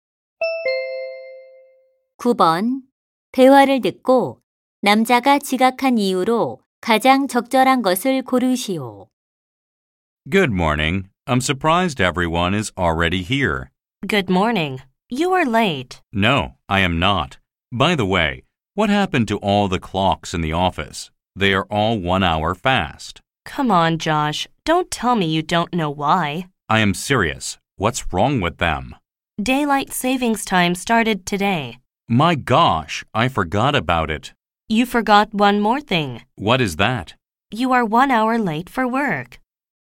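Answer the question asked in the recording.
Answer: 서머타임이 시작된 것을 잊어서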